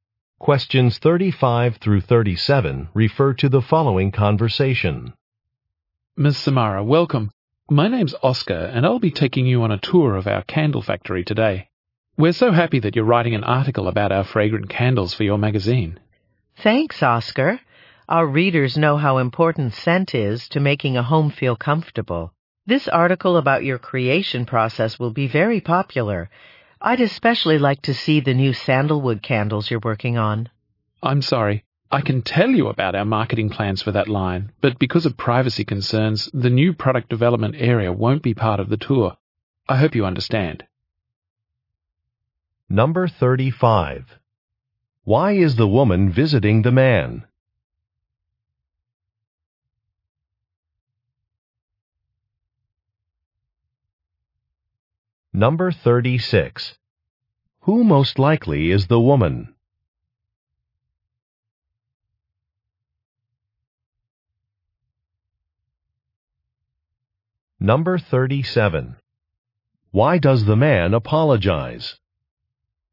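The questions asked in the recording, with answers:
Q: Why is the woman visiting the man?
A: To tour the candle factory for an article

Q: Who most likely is the woman?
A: A magazine writer

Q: Why does the man apologize?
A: The new product development area won't be part of the tour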